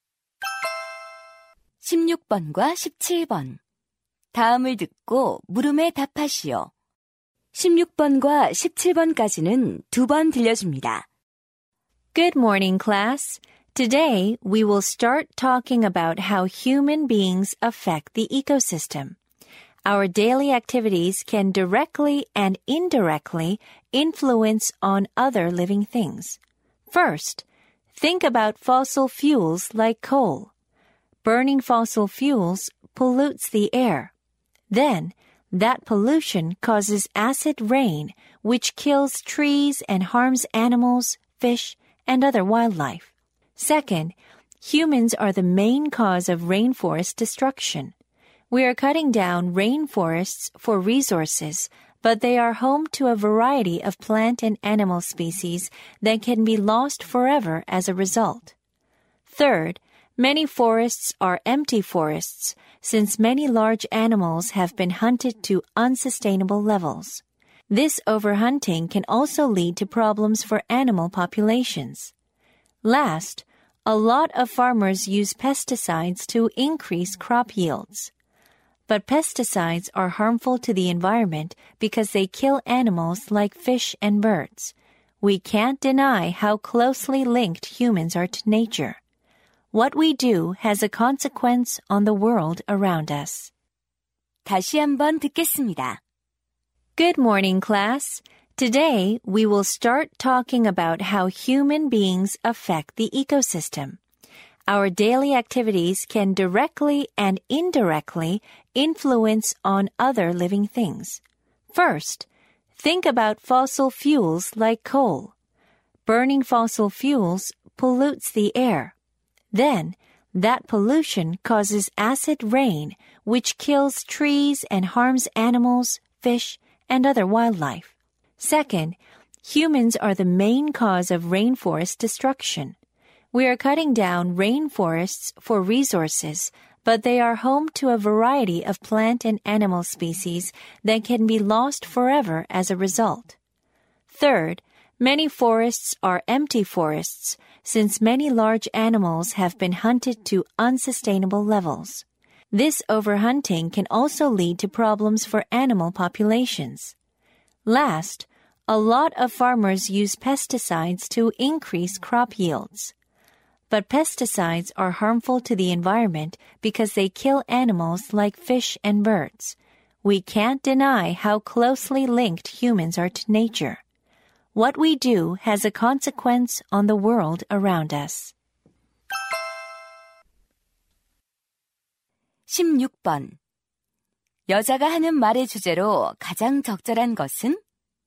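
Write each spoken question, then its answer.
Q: 여자가 하는 말의 주제로 가장 적절한 것은?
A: 인간 활동이 생태계에 미치는 영향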